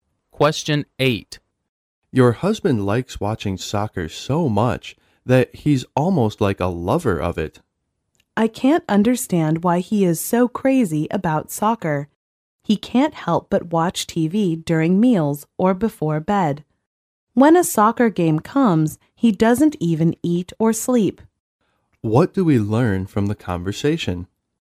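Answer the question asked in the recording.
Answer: The husband is crazy about soccer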